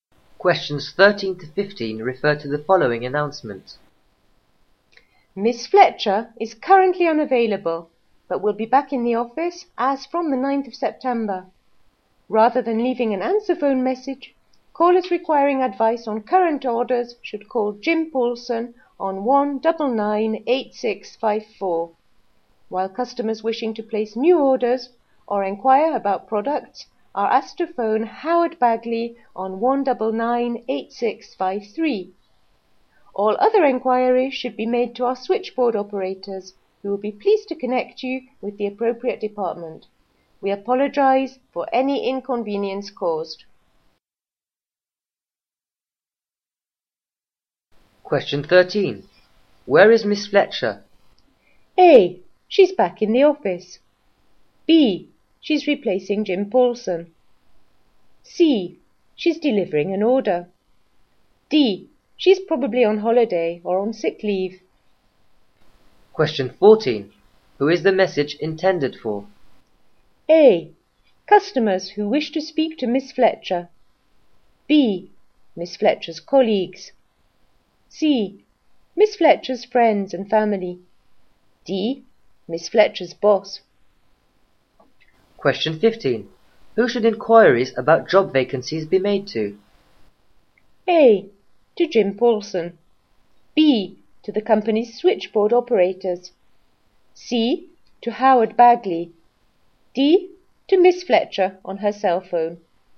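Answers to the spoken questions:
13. D: She's probably on holiday or on sick leave.
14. A: Customers who wish to speak to Miss Fletcher.
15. B: To the company's switchboard operators.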